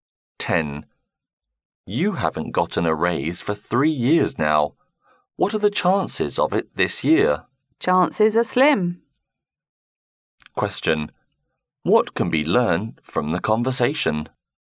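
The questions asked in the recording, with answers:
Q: What can be learned from the conversation?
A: The man is unlikely to get a raise this year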